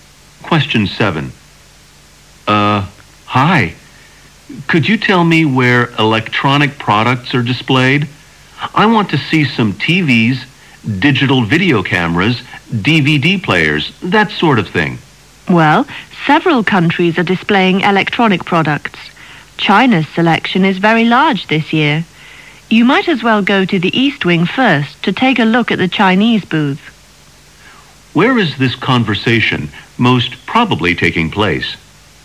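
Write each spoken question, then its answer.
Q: Where is this conversation most probably taking place?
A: At an international exhibition/trade fair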